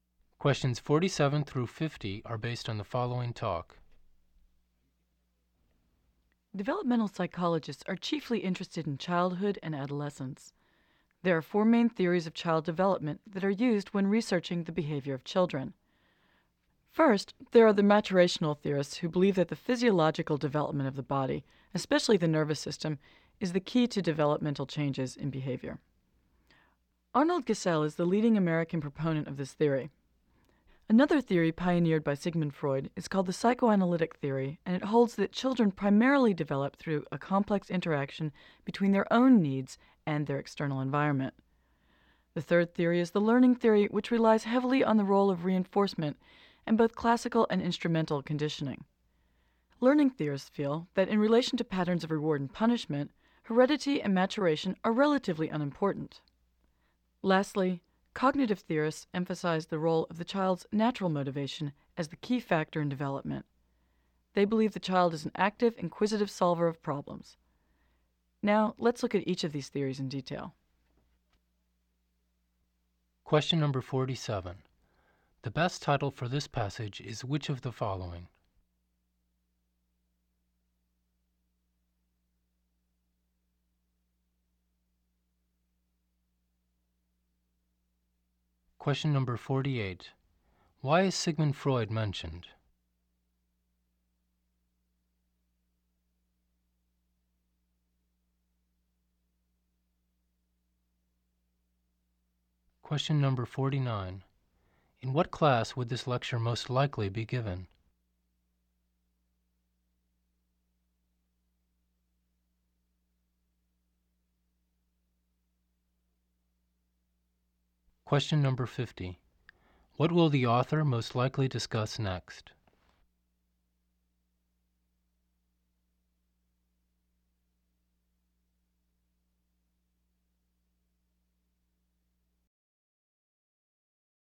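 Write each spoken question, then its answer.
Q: The best title for this passage is which of the following?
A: Four theories of child development

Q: Why is Sigmund Freud mentioned?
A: He pioneered the psychoanalytic theory

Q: In what class would this lecture most likely be given?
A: Developmental psychology

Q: What will the author most likely discuss next?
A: Each of the theories in detail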